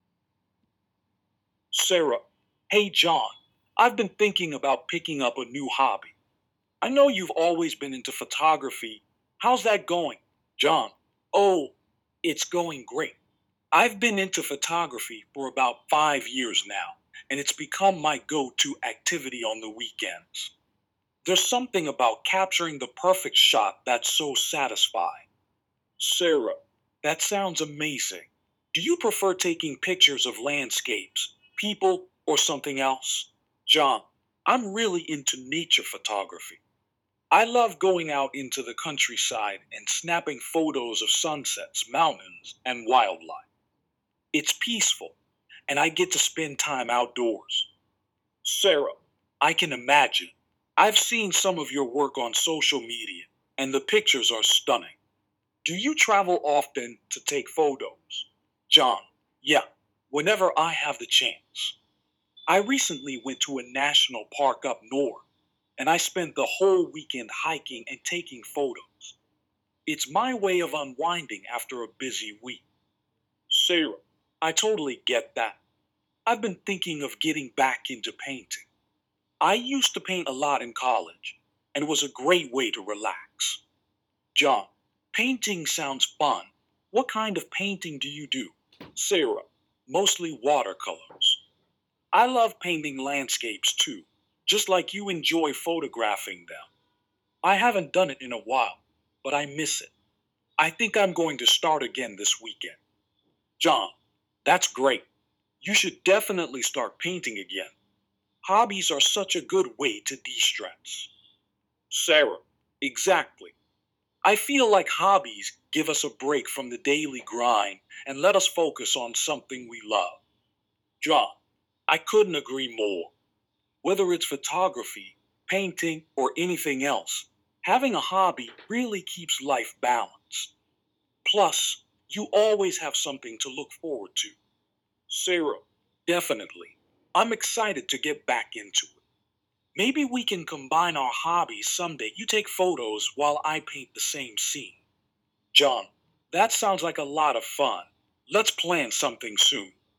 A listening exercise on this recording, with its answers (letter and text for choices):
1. What is John's favorite hobby?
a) Painting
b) Hiking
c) Photography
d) Traveling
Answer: c) Photography

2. How long has John been practicing photography?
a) 2 years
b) 3 years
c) 5 years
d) 7 years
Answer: c) 5 years

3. What type of photography does John enjoy the most?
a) Portrait photography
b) Urban photography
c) Wildlife and nature photography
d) Studio photography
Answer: c) Wildlife and nature photography

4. Where did John recently go for a photography trip?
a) A beach resort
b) A national park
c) A city tour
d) A forest camping site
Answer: b) A national park

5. What hobby is Sarah considering returning to?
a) Photography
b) Sculpting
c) Painting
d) Writing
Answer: c) Painting

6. What kind of painting does Sarah enjoy?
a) Abstract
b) Watercolors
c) Oil painting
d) Digital art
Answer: b) Watercolors

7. When does Sarah plan to start painting again?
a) Next month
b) This weekend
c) Next week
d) She hasn't decided yet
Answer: b) This weekend

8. What do John and Sarah both appreciate about their hobbies?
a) The opportunity to make money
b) The chance to relax and de-stress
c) The ability to compete with others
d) The physical activity involved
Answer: b) The chance to relax and de-stress

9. How does John feel about combining their hobbies in the future?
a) He is hesitant about the idea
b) He is excited and agrees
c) He thinks it's a waste of time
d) He prefers to stick to photography alone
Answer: b) He is excited and agrees

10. Why does John enjoy nature photography?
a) It allows him to work with models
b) He likes using high-tech equipment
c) It helps him unwind and enjoy the outdoors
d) It's the easiest type of photography to sell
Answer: c) It helps him unwind and enjoy the outdoors

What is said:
[Person A: Sarah]
Hey, John! I've been thinking about picking up a new hobby. I know you've always been into photography—how's that going?
[Person B: John]
Oh, it's going great! I've been into photography for about five years now, and it's become my go-to activity on the weekends. There's something about capturing the perfect shot that's so satisfying.
[Sarah]
That sounds amazing! Do you prefer taking pictures of landscapes, people, or something else?
[John]
I'm really into nature photography. I love going out into the countryside and snapping photos of sunsets, mountains, and wildlife. It's peaceful, and I get to spend time outdoors.
[Sarah]
I can imagine! I've seen some of your work on social media, and the pictures are stunning. Do you travel often to take photos?
[John]
Yeah, whenever I have the chance. I recently went to a national park up north, and I spent the whole weekend hiking and taking photos. It's my way of unwinding after a busy week.
[Sarah]
I totally get that. I've been thinking of getting back into painting. I used to paint a lot in college, and it was a great way to relax.
[John]
Painting sounds fun! What kind of painting do you do?
[Sarah]
Mostly watercolors. I love painting landscapes too, just like you enjoy photographing them. I haven't done it in a while, but I miss it. I think I'm going to start again this weekend.
[John]
That's great! You should definitely start painting again. Hobbies are such a good way to de-stress.
[Sarah]
Exactly. I feel like hobbies give us a break from the daily grind and let us focus on something we love.
[John]
I couldn't agree more. Whether it's photography, painting, or anything else, having a hobby really keeps life balanced. Plus, you always have something to look forward to.
[Sarah]
Definitely! I'm excited to get back into it. Maybe we can combine our hobbies someday—you take photos while I paint the same scene.
[John]
That sounds like a lot of fun! Let's plan something soon.